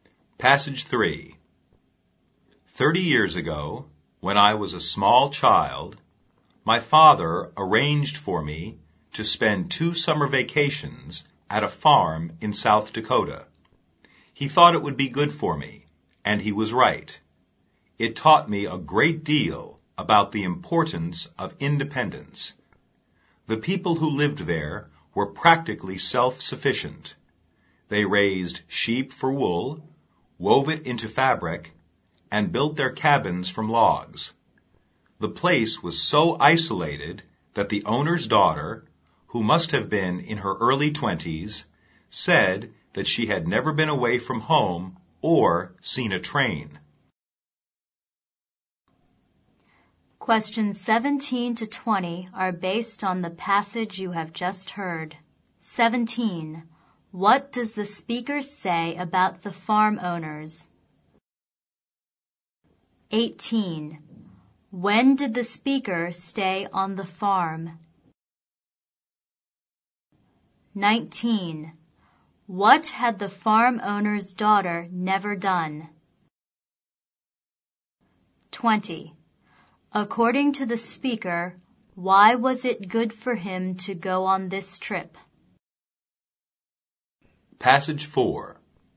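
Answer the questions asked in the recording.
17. They were practically self-sufficient
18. During two summer vacations when he was a small child, 30 years ago
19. Been away from home or seen a train
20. It taught him the importance of independence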